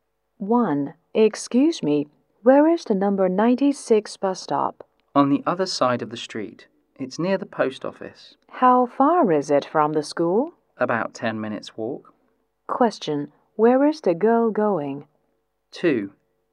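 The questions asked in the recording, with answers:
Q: Where is the girl going?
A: The number 96 bus stop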